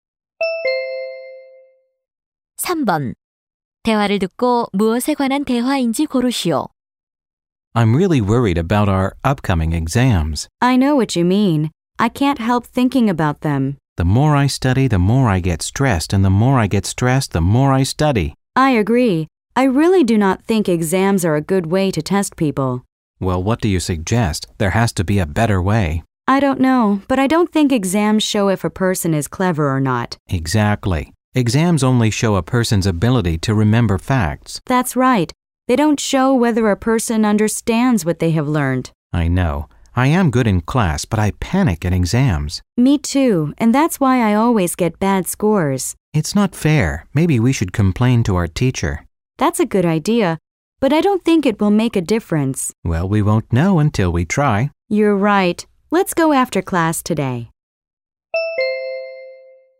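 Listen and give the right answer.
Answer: 시험 제도에 대한 불만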